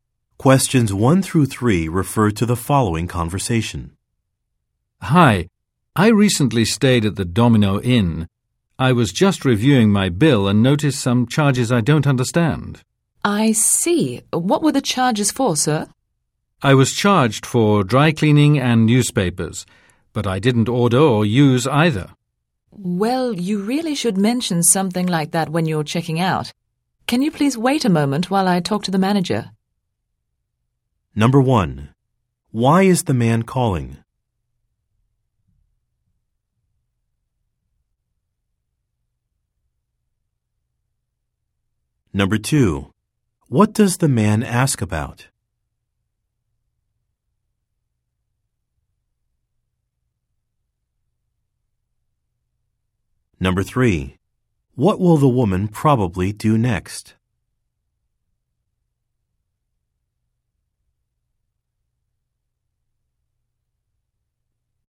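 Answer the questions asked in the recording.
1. To ask about charges on his hotel bill that he doesn't understand
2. Charges for dry cleaning and newspapers he didn't use
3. Talk to the manager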